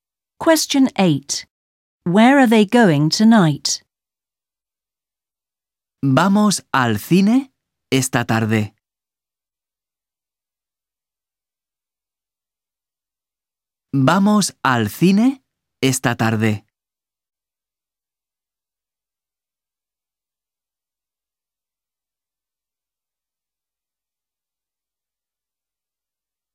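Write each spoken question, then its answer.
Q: Where are they going tonight?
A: To the cinema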